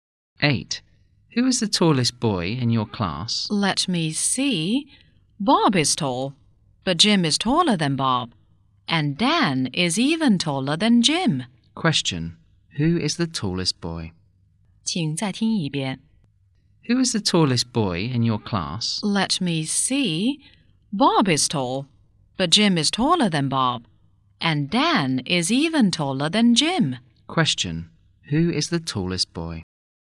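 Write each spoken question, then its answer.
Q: Who is the tallest boy?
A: Dan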